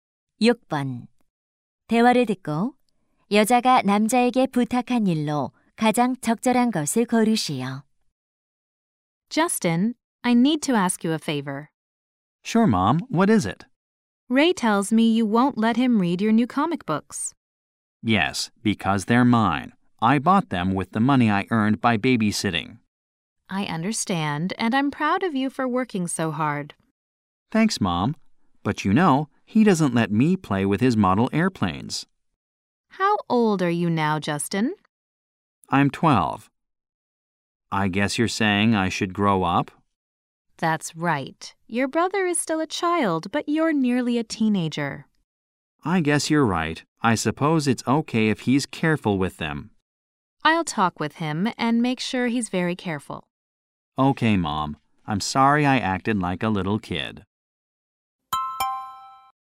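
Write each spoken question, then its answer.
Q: 대화를 듣고 여자가 남자에게 부탁한 일로 가장 적절한 것을 고르시오.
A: 동생에게 만화책을 읽게 해 주기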